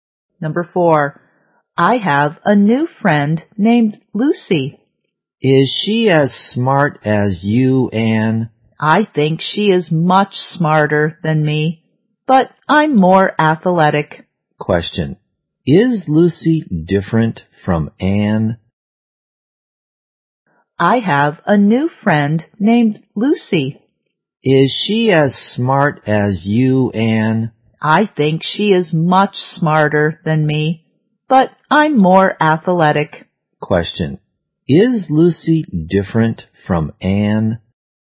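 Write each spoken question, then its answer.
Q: Is Lucy different from Anne?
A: Yes, Lucy is smarter and Anne is more athletic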